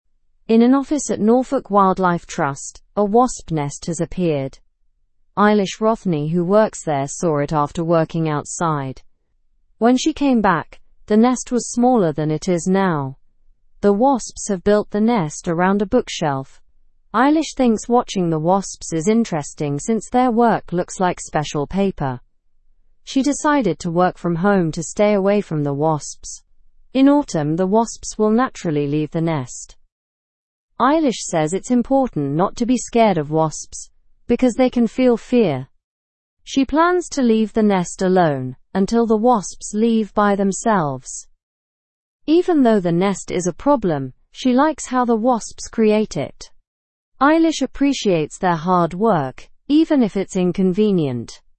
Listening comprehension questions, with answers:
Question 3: How did Eilish find the wasps' activities?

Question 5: When will the wasps leave the nest?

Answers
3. Eilish found the wasps' activities fascinating.
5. The wasps will leave the nest in autumn.

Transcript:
In an office at Norfolk Wildlife Trust, a wasp nest has appeared. Eilish Rothney, who works there, saw it after working outside. When she came back, the nest was smaller than it is now. The wasps have built the nest around a bookshelf. Eilish thinks watching the wasps is interesting since their work looks like special paper. She decided to work from home to stay away from the wasps. In autumn, the wasps will naturally leave the nest. Eilish says it's important not to be scared of wasps, because they can feel fear. She plans to leave the nest alone until the wasps leave by themselves. Even though the nest is a problem, she likes how the wasps create it.

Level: Level 2